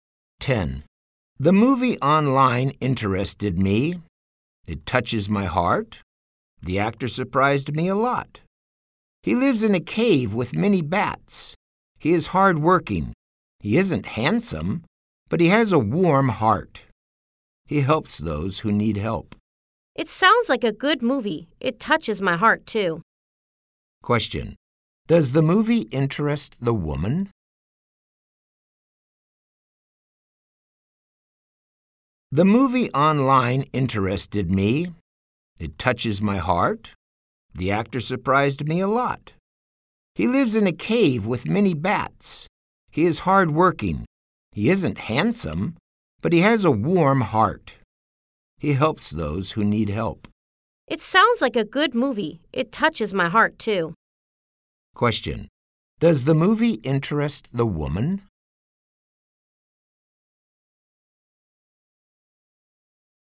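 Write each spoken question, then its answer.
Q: Does the movie interest the woman?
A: Yes, it does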